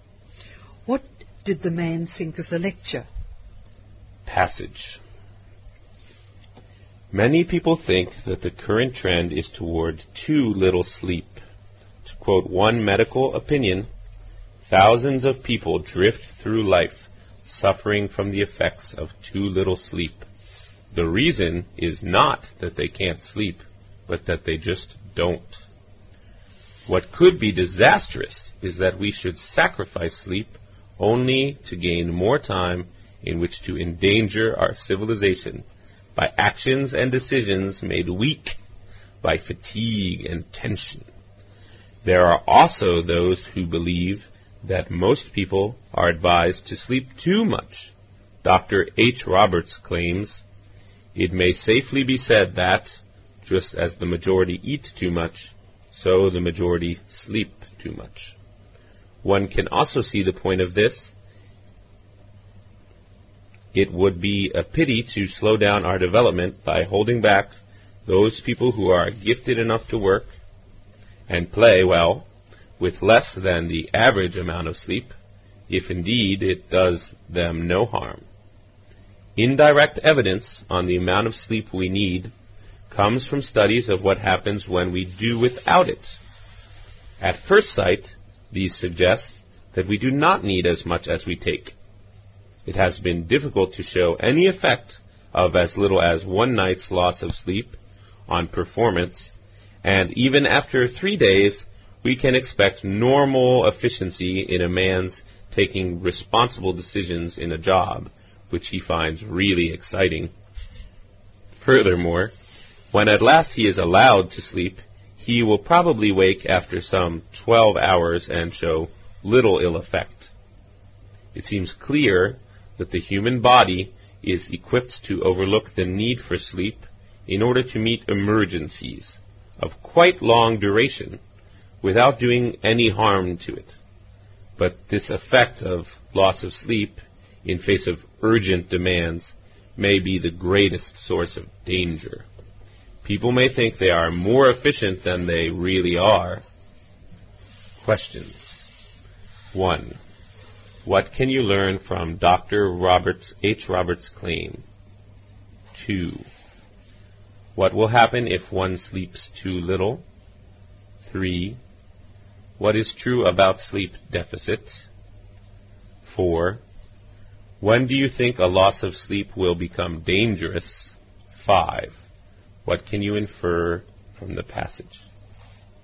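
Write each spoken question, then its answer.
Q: What can you learn from Dr. Roberts, H. Roberts' claim?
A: Most people sleep too much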